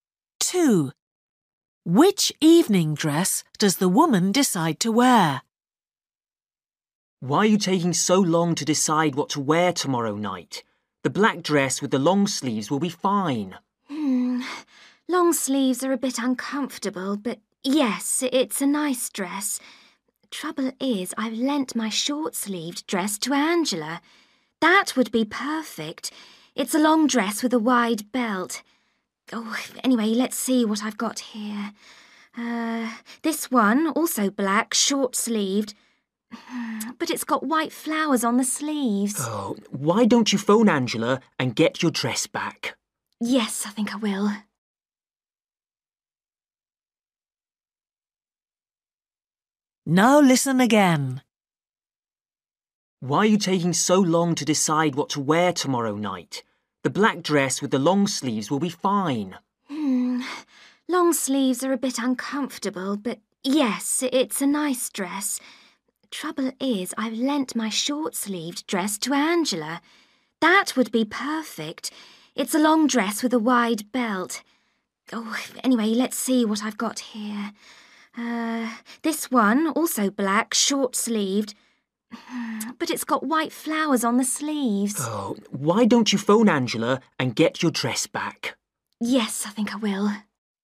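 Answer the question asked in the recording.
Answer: The long short-sleeved dress with a wide belt (lent to Angela)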